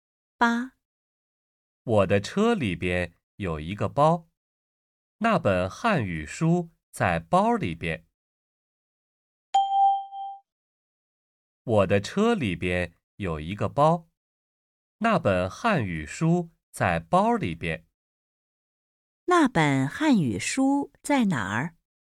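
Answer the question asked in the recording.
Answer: 在车里边的包里边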